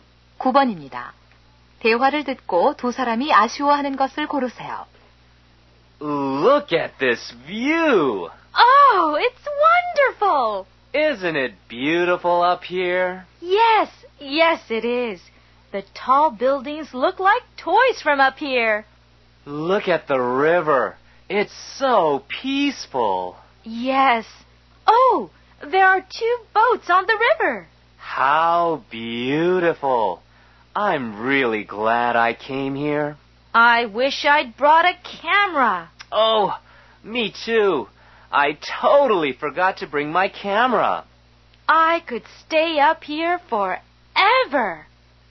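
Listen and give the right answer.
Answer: 카메라를 가져오지 않은 것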